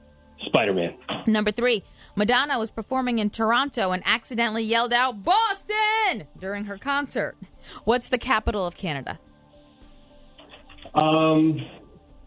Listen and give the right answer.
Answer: Ottawa.